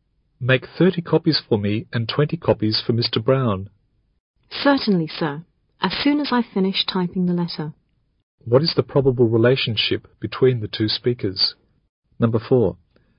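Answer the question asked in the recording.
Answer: Boss and secretary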